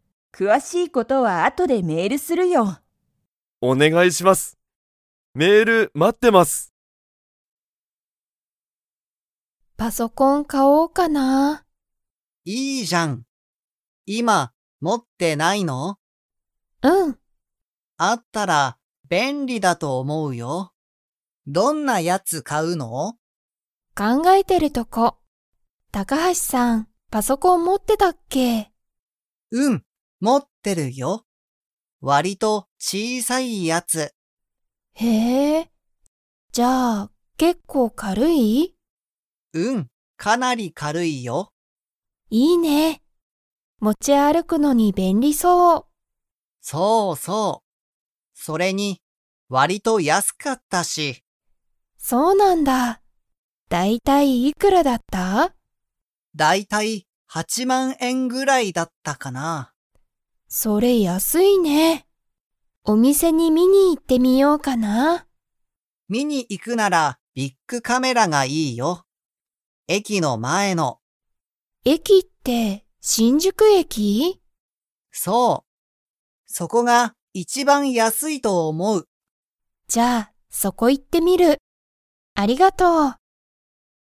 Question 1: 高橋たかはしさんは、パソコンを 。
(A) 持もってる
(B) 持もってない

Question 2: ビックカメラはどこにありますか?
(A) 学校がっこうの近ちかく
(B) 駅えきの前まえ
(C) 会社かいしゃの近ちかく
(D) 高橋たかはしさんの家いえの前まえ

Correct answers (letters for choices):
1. A
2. B

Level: Level 3